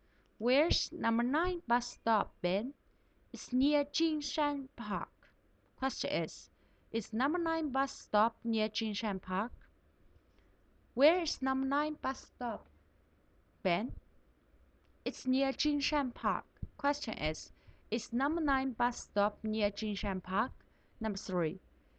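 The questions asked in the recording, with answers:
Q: number nine bus stop near Jinshan Park?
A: Yes, it is.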